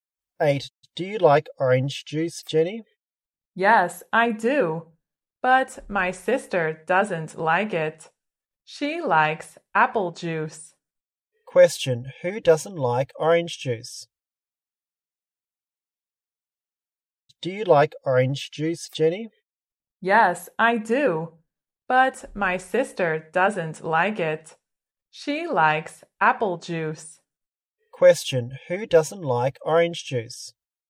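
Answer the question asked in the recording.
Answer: Jenny's sister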